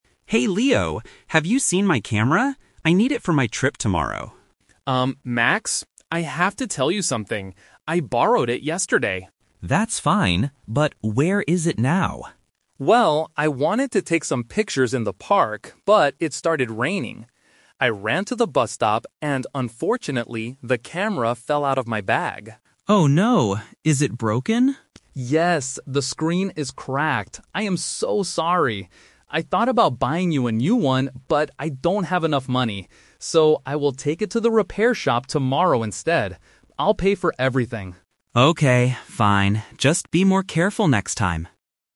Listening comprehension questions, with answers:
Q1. Why did Leo borrow the camera?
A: To take pictures in the park.

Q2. What happened to the camera?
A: It fell out of Leo's bag.

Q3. What will Leo do tomorrow?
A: Take the camera to a repair shop.

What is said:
Max: Hey Leo, have you seen my camera? I need it for my trip tomorrow.
Leo: Um, Max... I have to tell you something. I borrowed it yesterday.
Max: That's fine, but where is it now?
Leo: Well, I wanted to take some pictures in the park, but it started raining. I ran to the bus stop, and unfortunately, the camera fell out of my bag.
Max: Oh no! Is it broken?
Leo: Yes, the screen is cracked. I am so sorry! I thought about buying you a new one, but I don't have enough money. So, I will take it to the repair shop tomorrow instead. I'll pay for everything.
Max: Okay, fine. Just be more careful next time.